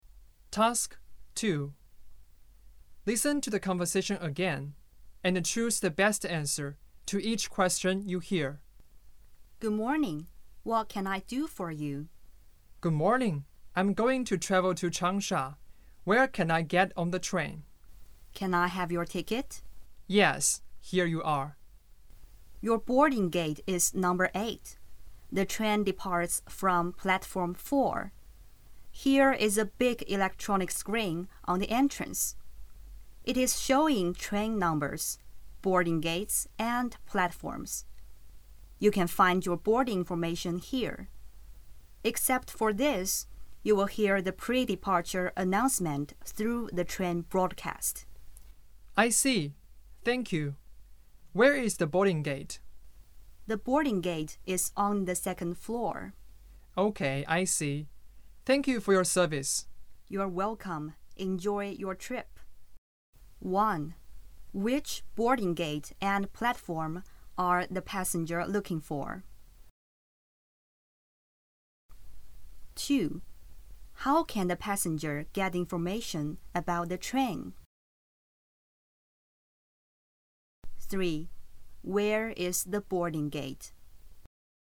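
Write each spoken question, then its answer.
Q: Which boarding gate and platform are the passenger looking for?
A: Gate 8 and platform 4

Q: How can the passenger get information about the train?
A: From the big electronic screen at the entrance and the train broadcast

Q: Where is the boarding gate?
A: On the 2nd floor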